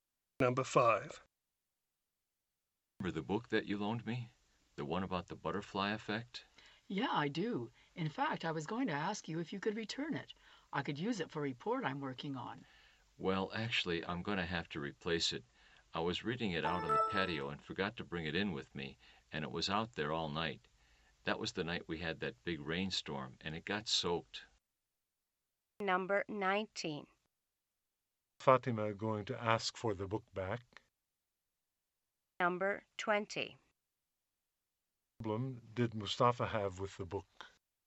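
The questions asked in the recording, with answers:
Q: Fatima going to ask for the book back.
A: She needs it for a report she is working on

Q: What problem did Mustafa have with the book?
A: He left it outside and it got soaked in a rainstorm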